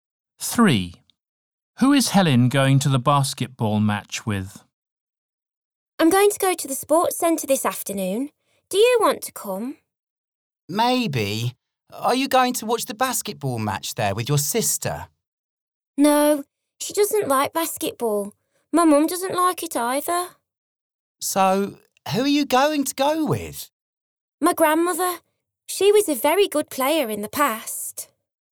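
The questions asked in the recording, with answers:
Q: Who is Helen going to the basketball match with?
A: Her grandmother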